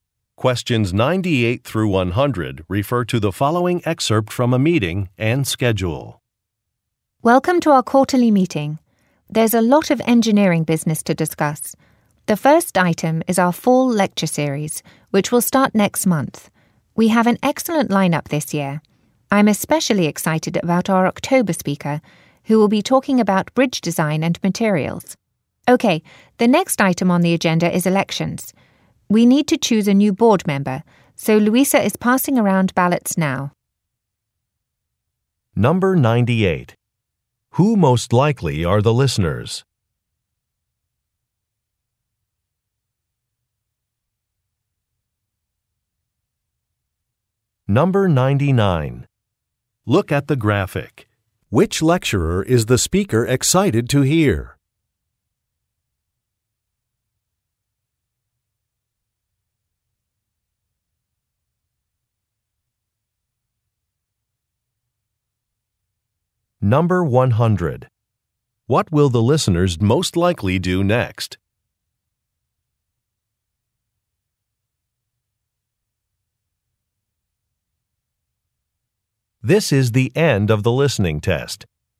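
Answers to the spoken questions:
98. Engineers
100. Vote for a new board member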